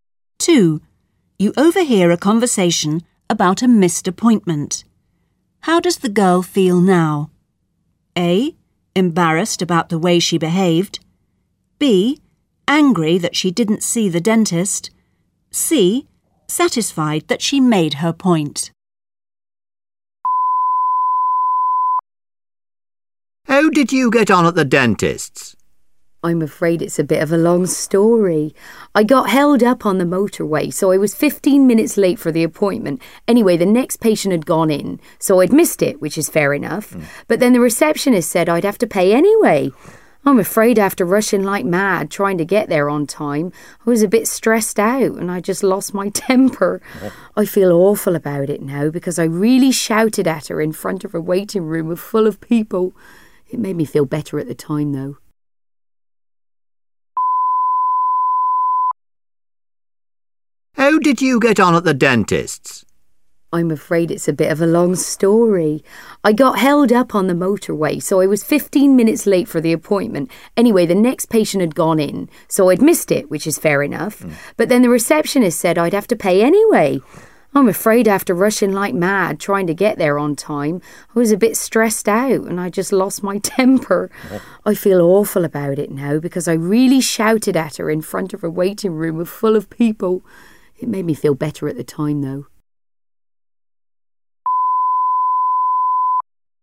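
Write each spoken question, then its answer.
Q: How does the girl feel now?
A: A: Embarrassed about the way she behaved.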